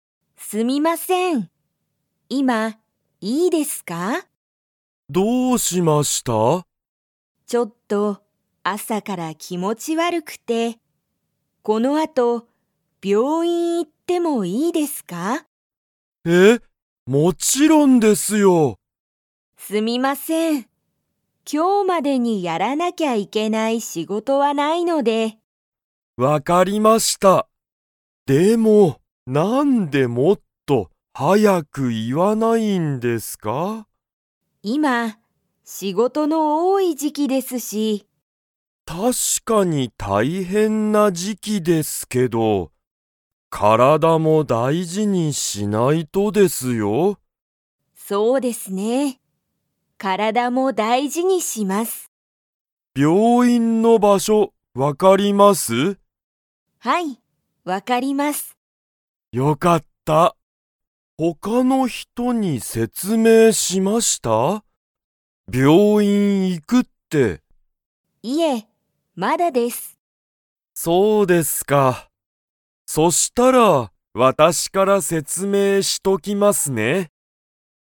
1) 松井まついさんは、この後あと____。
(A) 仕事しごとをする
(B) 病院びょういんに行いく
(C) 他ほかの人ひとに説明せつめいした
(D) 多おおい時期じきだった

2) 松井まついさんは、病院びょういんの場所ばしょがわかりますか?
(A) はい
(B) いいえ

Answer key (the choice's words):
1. 病院びょういんに行いく
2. はい

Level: Level 2